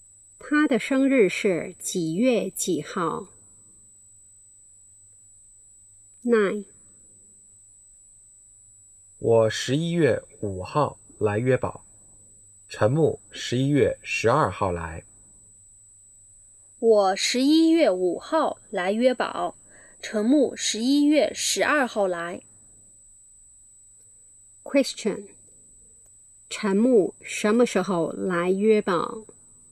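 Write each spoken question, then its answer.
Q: 陈木什么时候来约堡?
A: 11月12号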